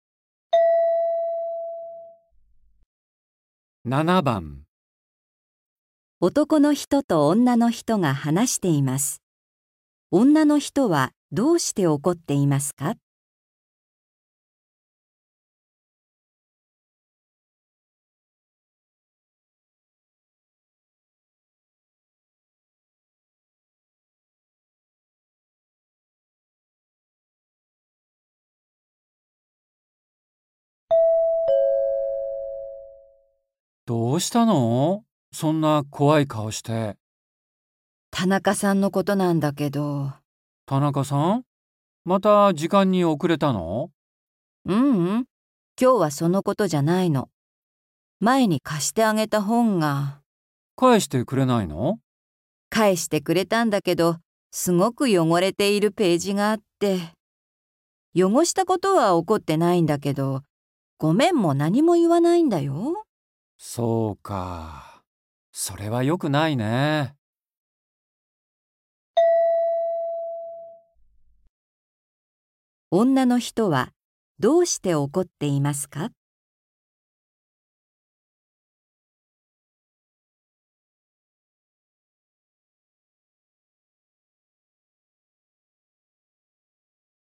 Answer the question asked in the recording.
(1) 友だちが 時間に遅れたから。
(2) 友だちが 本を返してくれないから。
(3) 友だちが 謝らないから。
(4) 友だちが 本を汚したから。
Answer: (3) 友だちが 謝らないから。

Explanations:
汚したことは怒ってないんだけど、ごめんも何も言わないんだよ。

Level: 初級